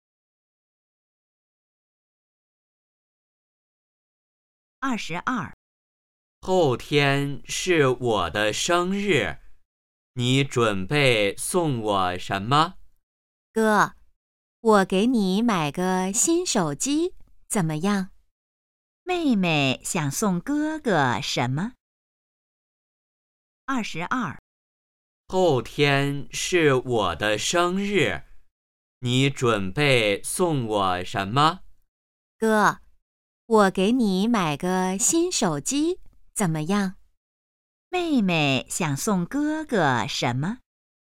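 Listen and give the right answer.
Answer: 新手机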